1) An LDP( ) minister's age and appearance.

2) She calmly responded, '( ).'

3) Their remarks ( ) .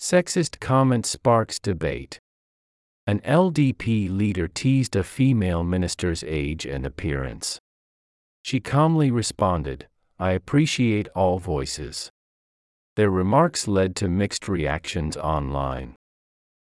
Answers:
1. leader teased a female
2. I appreciate all voices
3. led to mixed reactions online

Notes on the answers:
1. teased a female minister's age:tease(からかう)」を知らずに書けなかった人は、これを機会に覚えてください。知らない単語は聞き取れません。 a female」の冠詞を「the female」にした人は、「この英語ニュースの本文で初めて登場する大臣」という状況を考えましょう。 「このニュースが世間で広く知られているかどうか」は関係ありません。「世の中に複数存在するモノに初めて言及するときの冠詞は "a/an" 」と理解してください。 foreign minister(外務大臣)」であれば、該当者がひとりなので初登場でも「the」になりますが、「minister(大臣)」は複数存在します。 このため、いきなり「その大臣」と特定すると、(どの大臣?)と意味不明になります。
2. appreciate(感謝する):この部分は上川大臣の「感謝しています」という発言を現在形で引用しています。 appreciated」という過去形ではないので注意しましょう。
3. led to mixed reactions online(ネット上で賛否両論を引き起こした) :led to」は「lead to A(Aという結果につながる)」の過去形です。 led」を「let」と書いた人は、上記の意味を理解していない可能性が高く、語彙不足です。 mixed reactions」は「世間の人々の意見が分かれ、賛否両論がある」ときの定番表現です。無冠詞・複数で使うのが通常です。 mixed」を「next」にすると意味不明な文になります。「mixed reactions」で覚えましょう。 また、ネット接続している状態を表す「online」を「on line」と分けて綴ることは、現代英語ではほとんどありません。

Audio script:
Sexist Comment Sparks Debate
An LDP leader teased / a female minister's age and appearance./ She calmly responded, / 'I appreciate / all voices.'/ Their remarks led to / mixed reactions online.